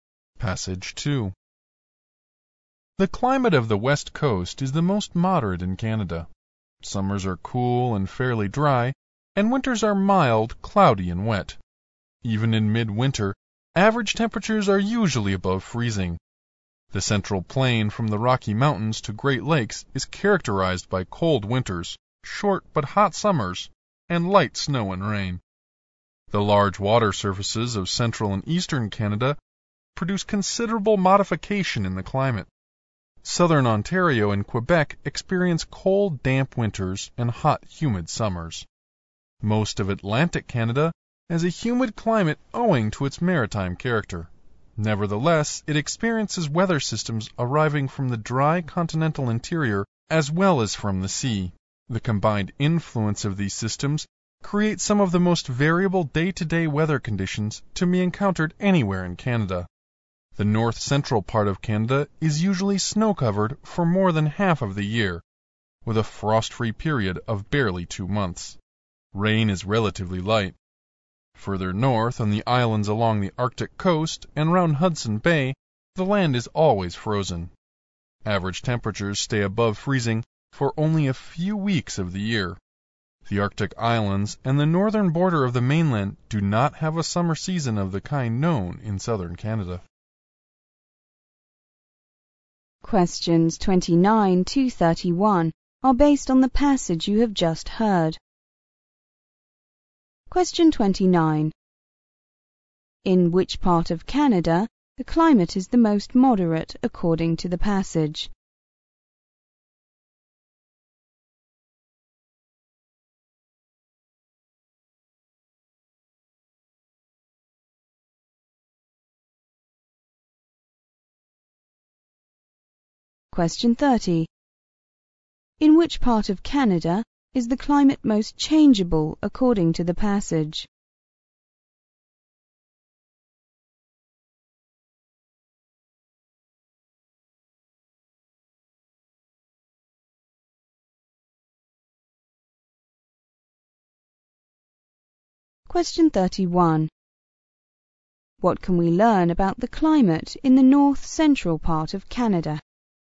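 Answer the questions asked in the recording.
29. The West Coast.
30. Atlantic Canada.
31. Snow covers it for more than half the year, with a frost-free period of barely 2 months.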